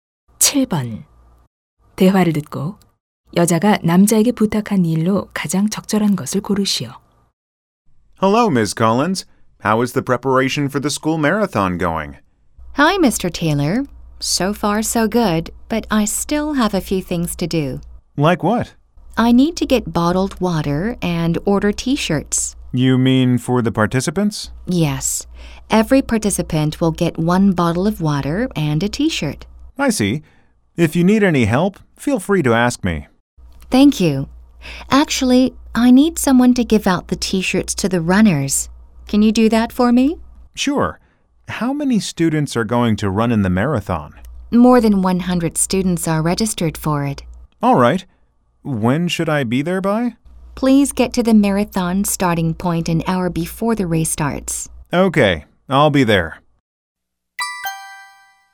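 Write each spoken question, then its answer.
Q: 대화를 듣고 여자가 남자에게 부탁한 일로 가장 적절한 것을 고르시오.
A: 마라톤 참가자들에게 티셔츠 나눠 주기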